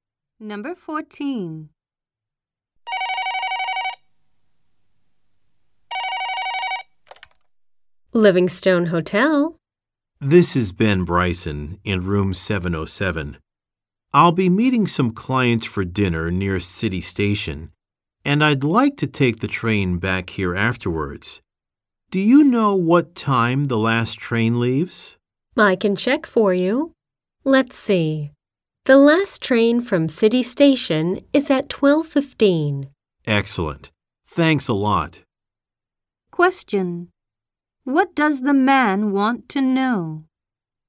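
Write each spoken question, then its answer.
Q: What does the man want to know?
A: What time the last train leaves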